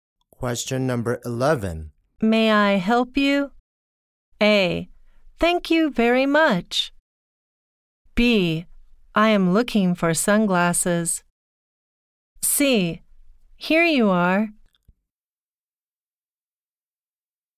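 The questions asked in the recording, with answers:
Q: May I help you?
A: B: I am looking for sunglasses.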